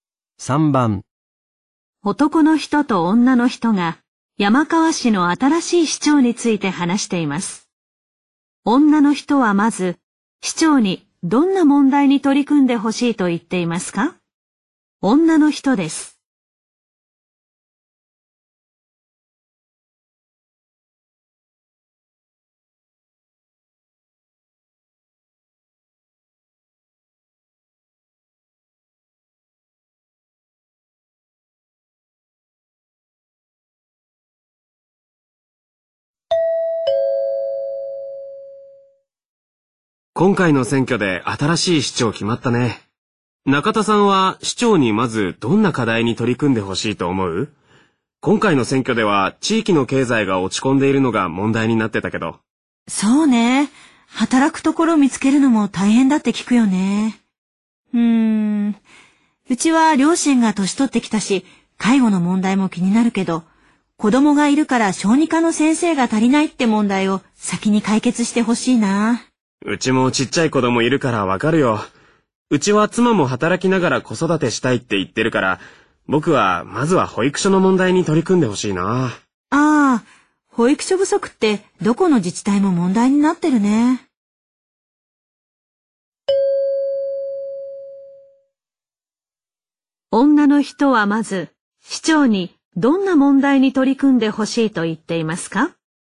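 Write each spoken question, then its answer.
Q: 女の人はまず、市長にどんな問題に取り組んでほしいと言っていますか?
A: 小児科の先生が足りない問題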